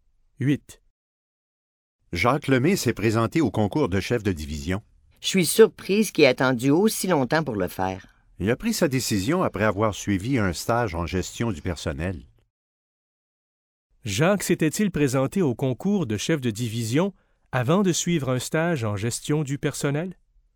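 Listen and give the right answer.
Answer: Non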